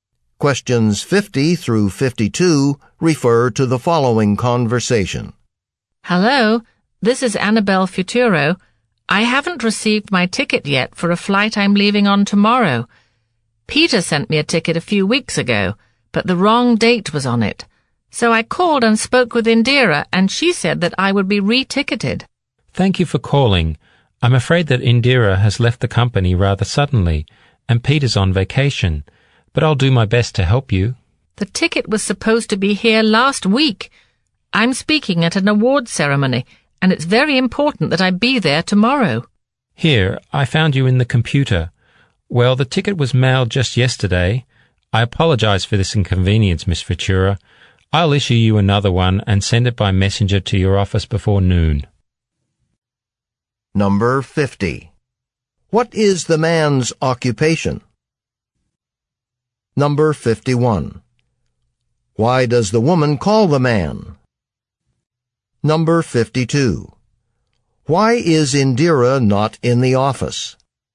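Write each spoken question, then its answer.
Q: Why does the woman call the man?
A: She hasn't received her ticket for tomorrow's flight

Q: Why is Indira not in the office?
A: She left the company suddenly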